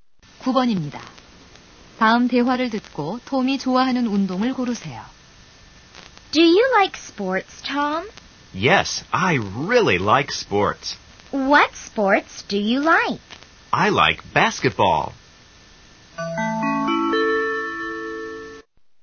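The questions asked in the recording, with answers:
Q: 다음 대화를 듣고 톰이 좋아하는 운동을 고르세요.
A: 농구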